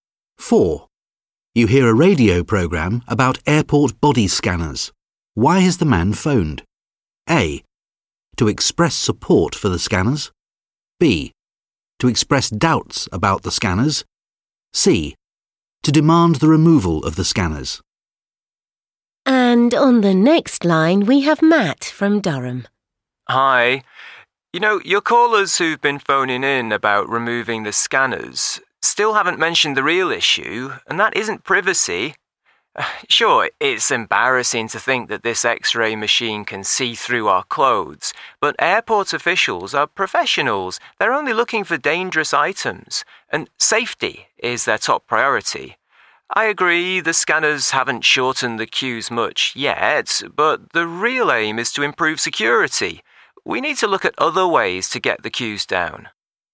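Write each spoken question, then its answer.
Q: Why has the man phoned?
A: A: To express support for the scanners.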